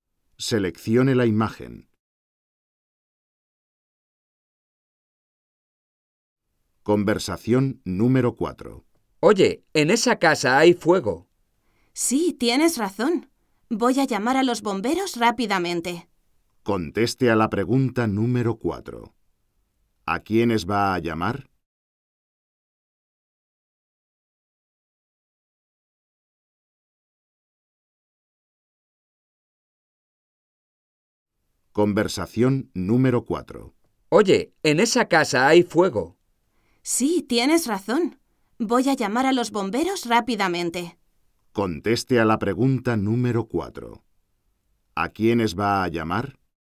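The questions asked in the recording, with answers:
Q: ¿A quiénes va a llamar?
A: A los bomberos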